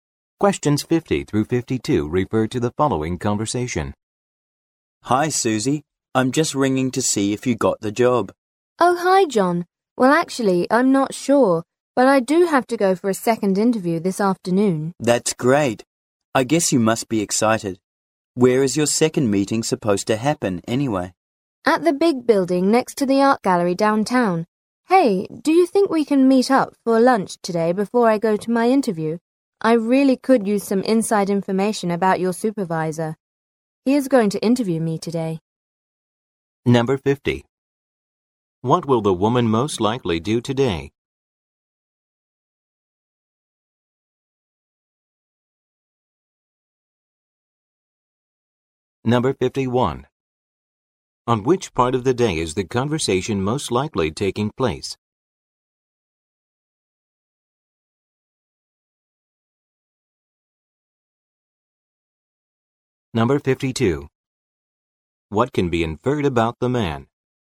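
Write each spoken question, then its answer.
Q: What will the woman most likely do today?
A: Go to a second job interview

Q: On which part of the day is the conversation most likely taking place?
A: In the morning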